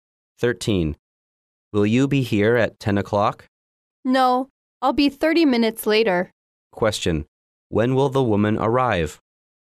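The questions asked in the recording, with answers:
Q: When will the woman arrive?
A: At 10:30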